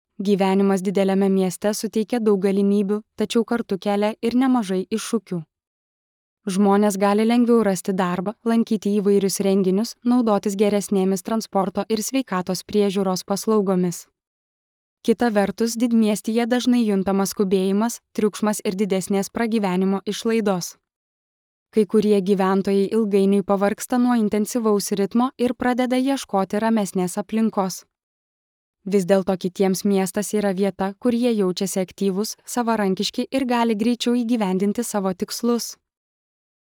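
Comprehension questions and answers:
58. Apie ką kalbama įraše?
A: Apie gyvenimą dideliame mieste

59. Kas paminėta kaip didelio miesto privalumas?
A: Lengviau rasti darbą ir naudotis paslaugomis

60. Kodėl kai kurie žmonės pavargsta nuo didmiesčio?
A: Dėl intensyvaus ritmo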